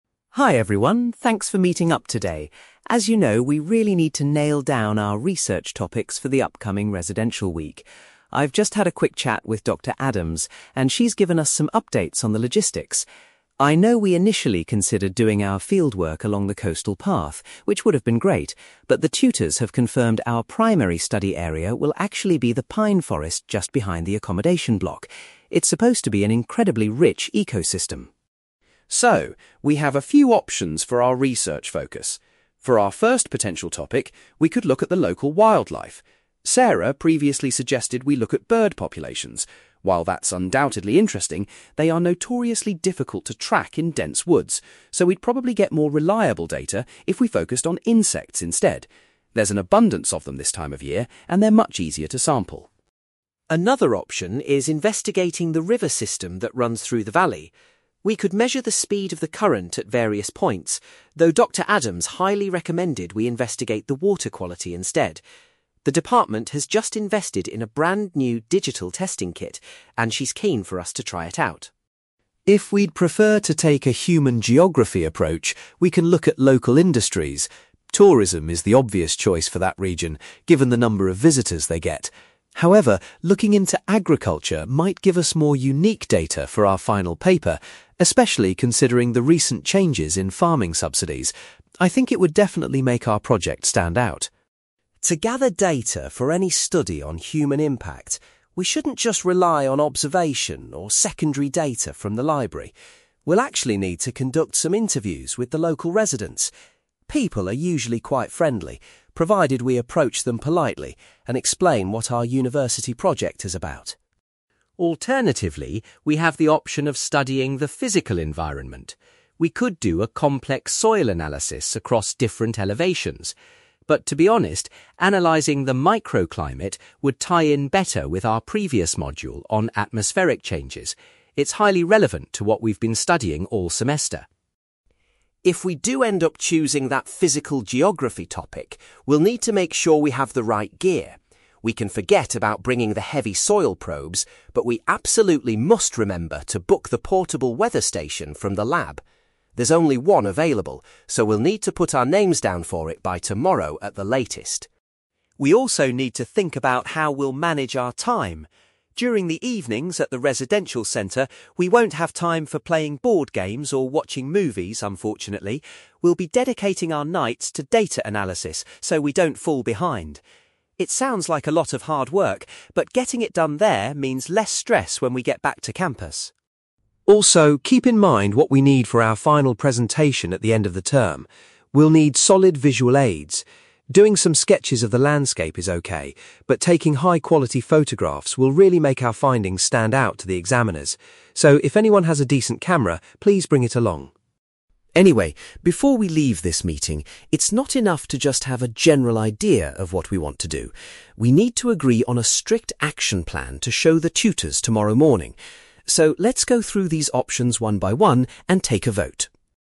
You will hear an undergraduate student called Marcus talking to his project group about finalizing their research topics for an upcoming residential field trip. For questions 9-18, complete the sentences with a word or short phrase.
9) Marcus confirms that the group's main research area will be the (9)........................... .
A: pine forest

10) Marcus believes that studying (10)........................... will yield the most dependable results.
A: insects

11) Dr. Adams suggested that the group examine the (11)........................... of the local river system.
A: water quality

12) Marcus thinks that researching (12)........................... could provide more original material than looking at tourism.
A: agriculture

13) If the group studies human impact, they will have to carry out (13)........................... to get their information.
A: interviews

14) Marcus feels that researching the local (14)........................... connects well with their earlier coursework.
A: micro-climate

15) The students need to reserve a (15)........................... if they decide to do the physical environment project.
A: weather station

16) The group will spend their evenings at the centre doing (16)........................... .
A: data analysis

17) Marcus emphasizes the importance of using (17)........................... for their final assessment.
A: photographs

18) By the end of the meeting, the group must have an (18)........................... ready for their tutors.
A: action plan

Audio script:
Marcus: Hi everyone, thanks for meeting up today. As you know, we really need to nail down our research topics for the upcoming residential week. I've just had a quick chat with Dr. Adams, and she's given us some updates on the logistics. I know we initially considered doing our fieldwork along the coastal path, which would have been great, but the tutors have confirmed our primary study area will actually be the pine forest just behind the accommodation block. It's supposed to be an incredibly rich ecosystem.
So, we have a few options for our research focus. For our first potential topic, we could look at the local wildlife. Sarah previously suggested we look at bird populations. While that's undoubtedly interesting, they are notoriously difficult to track in dense woods, so we'd probably get more reliable data if we focused on insects instead. There's an abundance of them this time of year, and they're much easier to sample.
Another option is investigating the river system that runs through the valley. We could measure the speed of the current at various points, though Dr. Adams highly recommended we investigate the water quality instead. The department has just invested in a brand new digital testing kit, and she's keen for us to try it out.
If we'd prefer to take a human geography approach, we can look at local industries. Tourism is the obvious choice for that region, given the number of visitors they get. However, looking into agriculture might give us more unique data for our final paper, especially considering the recent changes in farming subsidies. I think it would definitely make our project stand out.
To gather data for any study on human impact, we shouldn't just rely on observation or secondary data from the library. We'll actually need to conduct some interviews with the local residents. People are usually quite friendly, provided we approach them politely and explain what our university project is about.
Alternatively, we have the option of studying the physical environment. We could do a complex soil analysis across different elevations. But to be honest, analysing the micro-climate would tie in better with our previous module on atmospheric changes. It's highly relevant to what we've been studying all semester.
If we do end up choosing that physical geography topic, we'll need to make sure we have the right gear. We can forget about bringing the heavy soil probes; but we absolutely must remember to book the portable weather station from the lab. There's only one available, so we'll need to put our names down for it by tomorrow at the latest.
We also need to think about how we'll manage our time. During the evenings at the residential centre, we won't have time for playing board games or watching movies, unfortunately. We'll be dedicating our nights to data analysis so we don't fall behind. It sounds like a lot of hard work, but getting it done there means less stress when we get back to campus.
Also, keep in mind what we need for our final presentation at the end of the term. We'll need solid visual aids. Doing some sketches of the landscape is okay, but taking high-quality photographs will really make our findings stand out to the examiners. So, if anyone has a decent camera, please bring it along.
Anyway, before we leave this meeting, it's not enough to just have a general idea of what we want to do. We need to agree on a strict action plan to show the tutors tomorrow morning. So, let's go through these options one by one and take a vote.

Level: B2